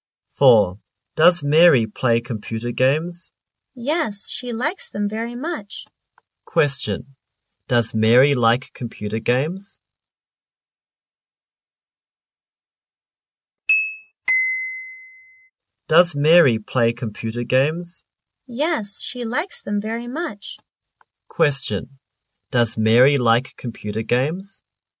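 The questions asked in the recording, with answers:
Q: does Mary like computer games?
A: Yes, she does.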